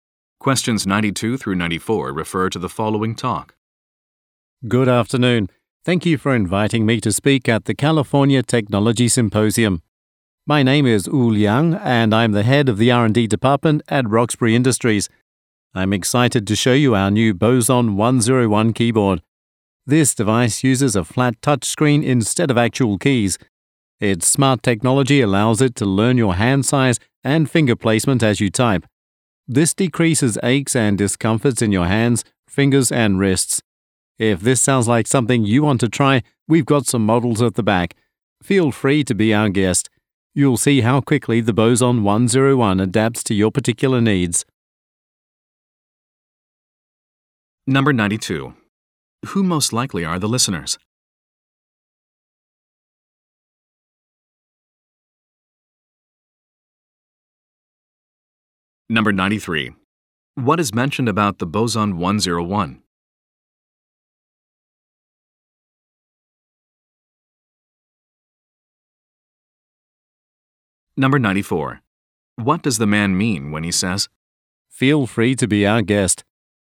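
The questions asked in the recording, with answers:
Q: Who most likely are the listeners?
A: Attendees at a technology symposium

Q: What is mentioned about the Boson 101?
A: It learns the user's hand size and finger placement

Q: What does the man mean when he says,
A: Listeners are invited to try the keyboard models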